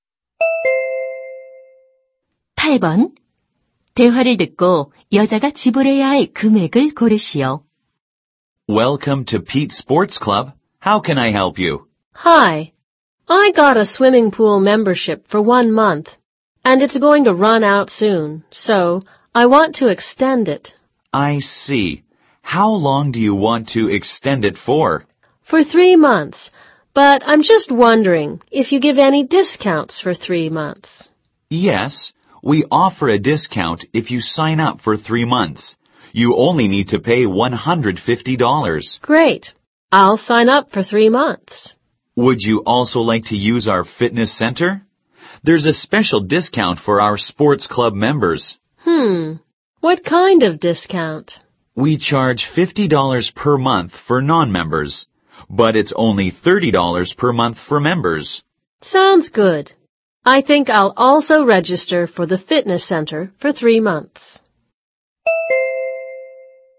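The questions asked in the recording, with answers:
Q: 대화를 듣고 여자가 지불해야 할 금액을 고르시오.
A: $240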